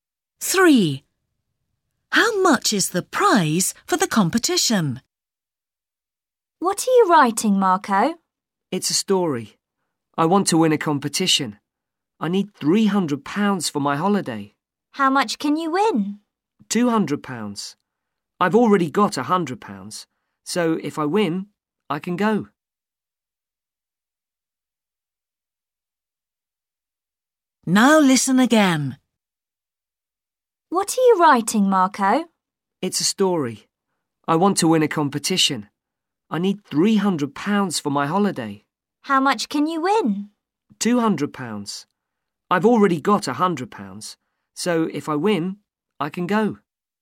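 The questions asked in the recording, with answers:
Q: How much is the prize for the competition?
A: £200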